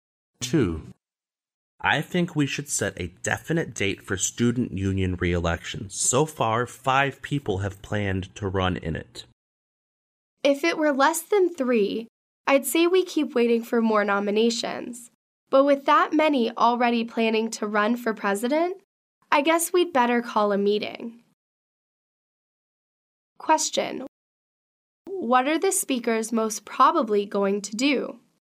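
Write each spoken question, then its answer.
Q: What are the speakers most probably going to do?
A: Call a meeting to set a date for the student union elections.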